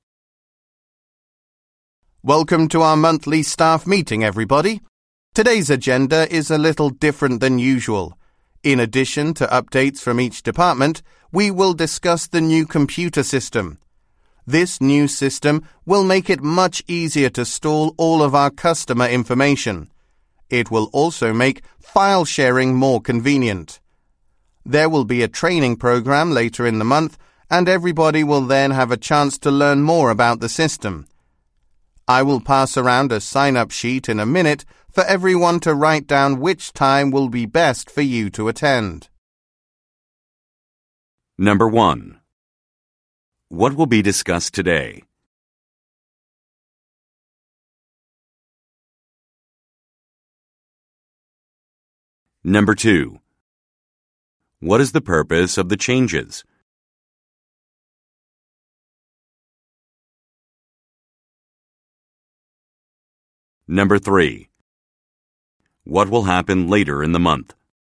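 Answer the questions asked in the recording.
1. Department updates and the new computer system
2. To make storing customer information and file sharing easier
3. A training program on the new system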